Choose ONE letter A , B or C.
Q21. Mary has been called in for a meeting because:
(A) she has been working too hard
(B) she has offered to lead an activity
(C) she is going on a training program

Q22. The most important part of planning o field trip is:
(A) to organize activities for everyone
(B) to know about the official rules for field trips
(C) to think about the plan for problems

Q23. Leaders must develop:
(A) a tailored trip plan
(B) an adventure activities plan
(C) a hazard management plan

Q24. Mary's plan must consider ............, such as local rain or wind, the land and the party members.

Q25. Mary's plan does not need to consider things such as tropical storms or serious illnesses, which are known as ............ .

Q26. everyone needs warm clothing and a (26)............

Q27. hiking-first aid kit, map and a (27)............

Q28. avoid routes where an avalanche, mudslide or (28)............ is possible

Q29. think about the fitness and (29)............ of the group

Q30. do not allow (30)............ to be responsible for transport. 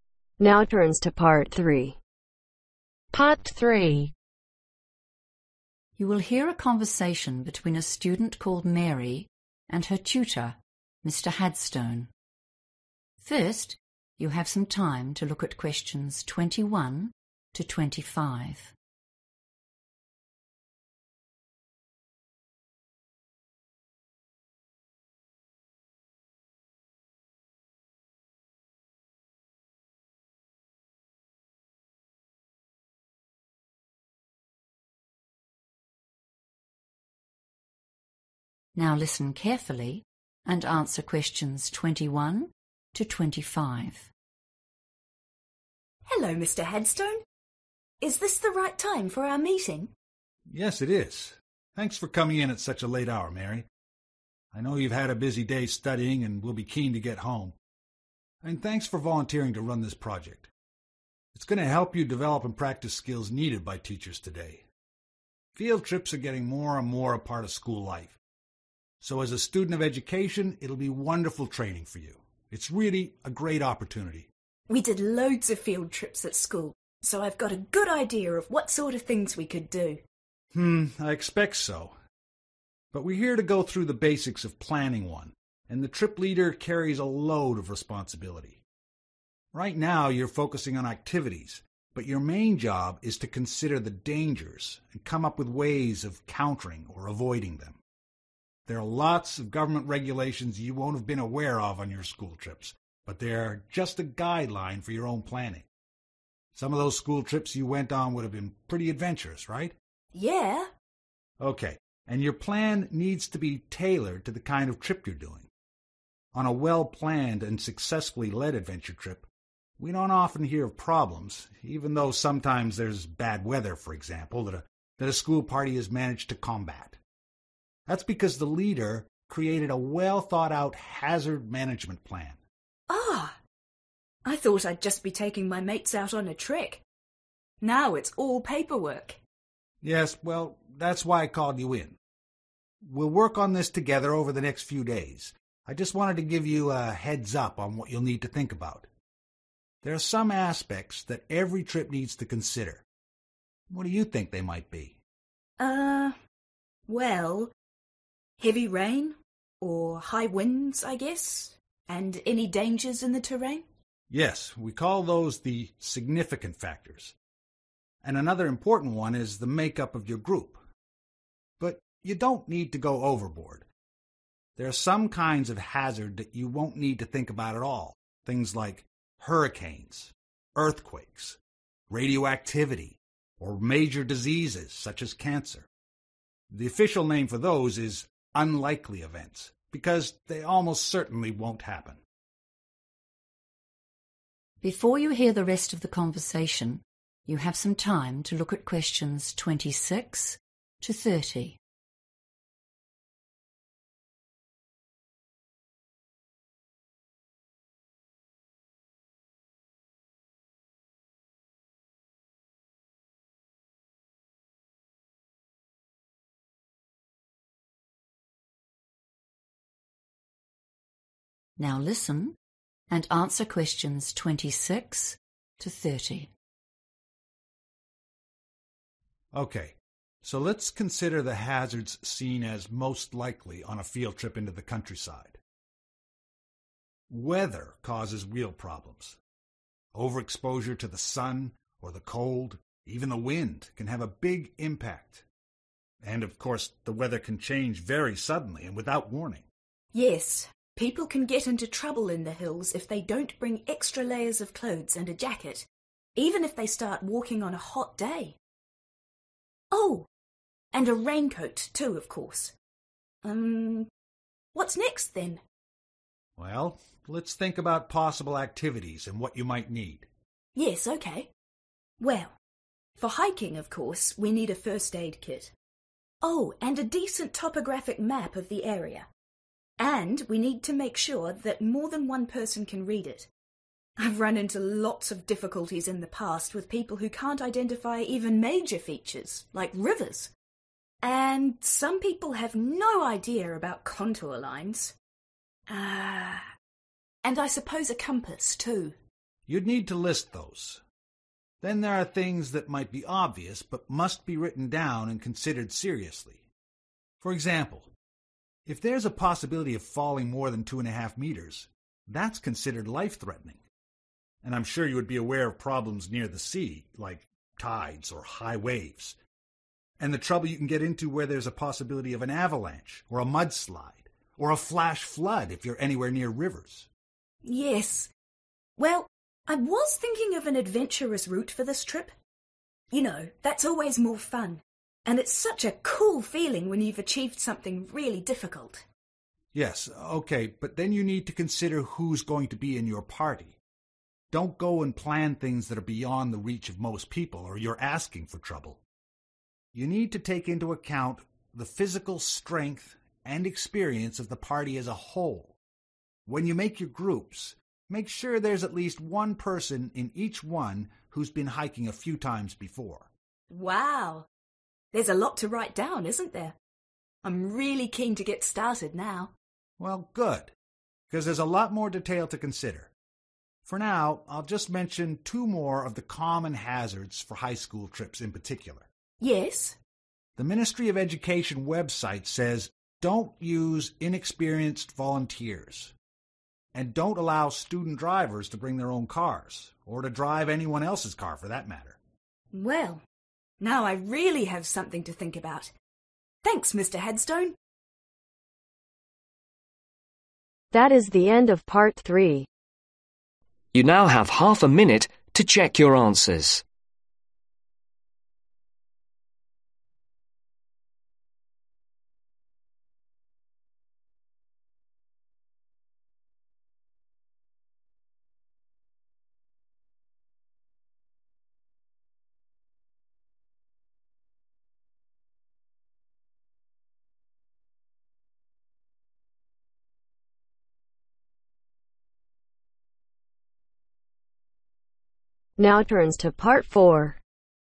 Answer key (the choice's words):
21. she has offered to lead an activity
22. to think about the plan for problems
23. a hazard management plan
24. Significant factors
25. Unlikely Events
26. Raincoat
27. Compass
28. Flash flood
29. Experience
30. Student drivers